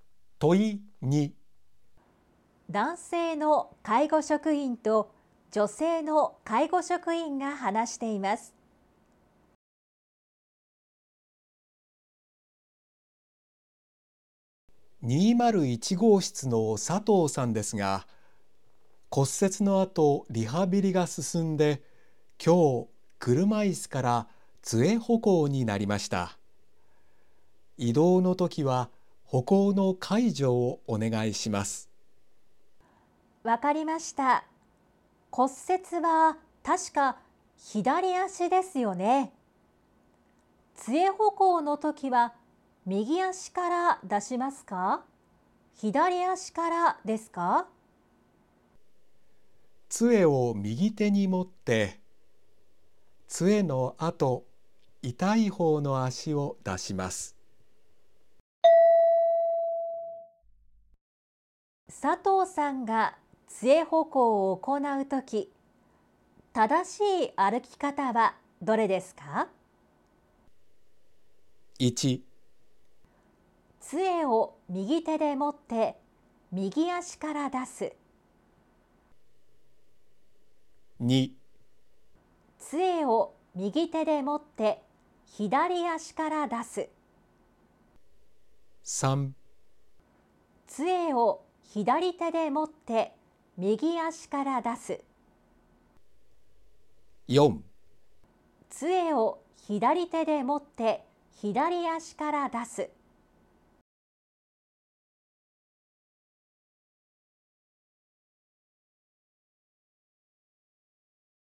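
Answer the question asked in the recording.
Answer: 2: 杖を右手で持って左足から出す。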